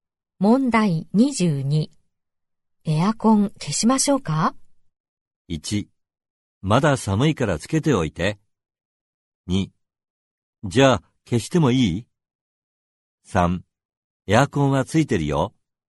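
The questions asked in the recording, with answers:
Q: エアコン消しましょうか?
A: 1: まだ寒いからつけておいて。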